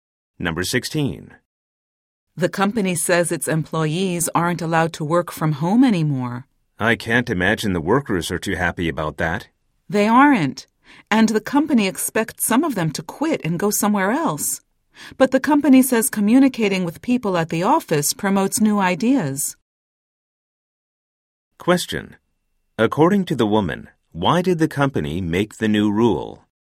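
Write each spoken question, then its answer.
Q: According to the woman, why did the company make the new rule?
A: Communicating at the office promotes new ideas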